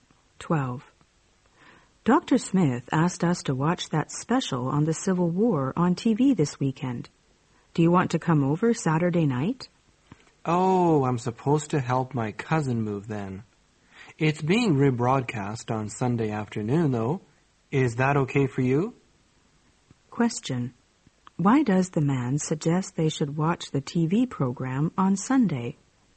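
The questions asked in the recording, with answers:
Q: Why does the man suggest they should watch the TV program on Sunday?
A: The woman is busy helping her cousin move on Saturday night.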